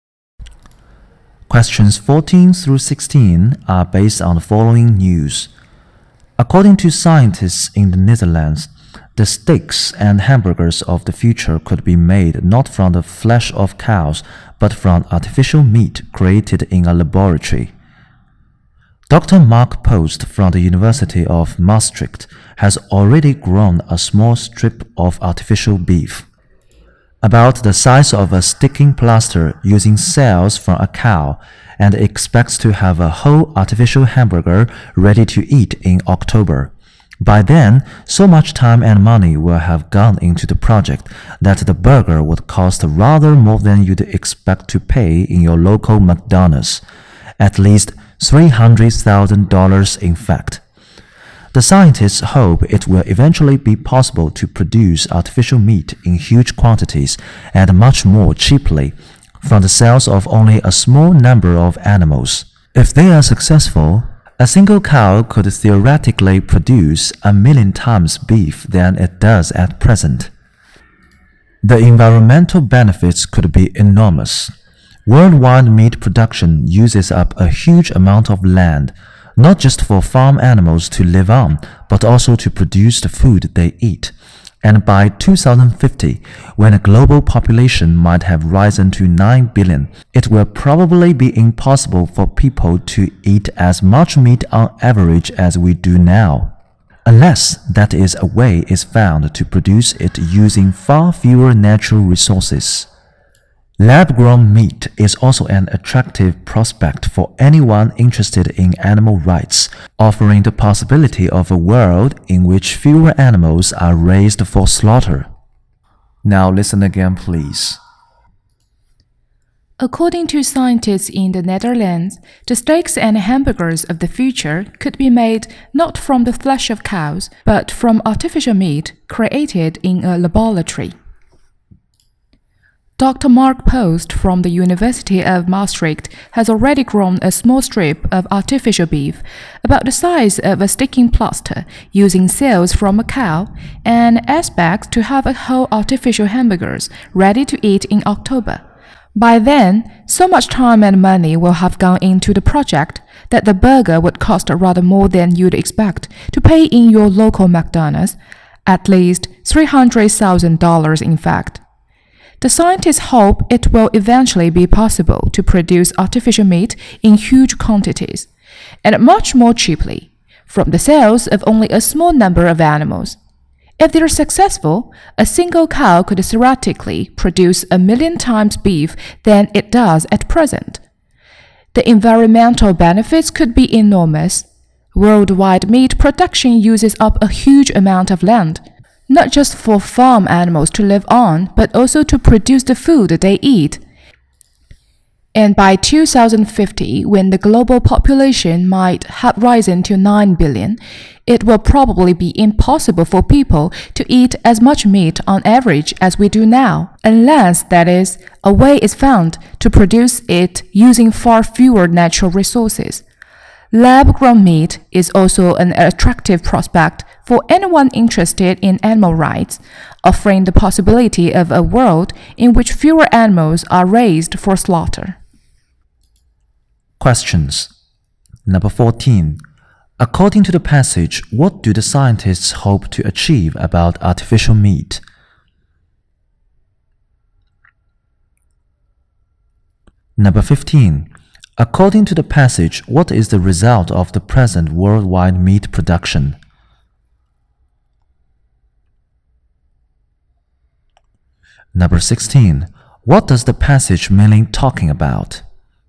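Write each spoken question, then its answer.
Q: According to the passage, what do the scientists hope to achieve about artificial meat?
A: To produce it in huge quantities and much more cheaply from the cells of a few animals

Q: According to the passage, what is the result of the present worldwide meat production?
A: It uses up a huge amount of land

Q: What does the passage mean talking about?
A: Lab-grown artificial meat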